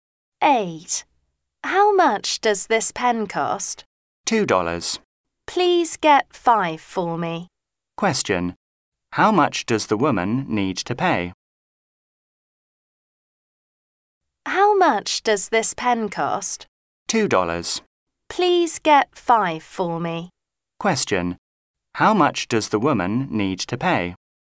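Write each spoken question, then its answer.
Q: Question. How much does the woman need to pay?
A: $10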